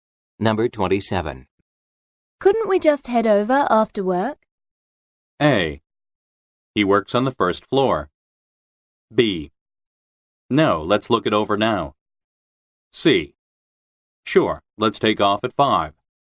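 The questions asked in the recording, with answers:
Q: Couldn't we just head over after work?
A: C: Sure, let's take off at 5.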